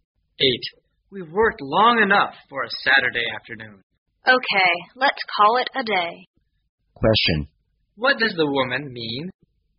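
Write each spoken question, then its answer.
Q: What does the woman mean?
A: They should stop working for the day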